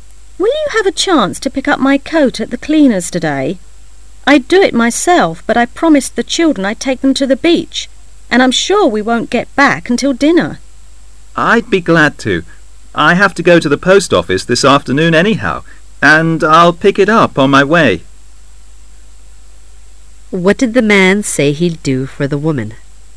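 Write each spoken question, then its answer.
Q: What did the man say he'd do for the woman?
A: Pick up her coat at the cleaners

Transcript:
[解析] W:Will you have a chance to pick up my coat at the cleaner's today. I'd do it myself,but I promised the children I'd take them to the beach,and I'm sure we won't get back until dinner. M:I'll be glad to.I have to go to the post office this afternoon anyhow,and I'll pick it up on my way. Q:What did the man say he'd do for the woman?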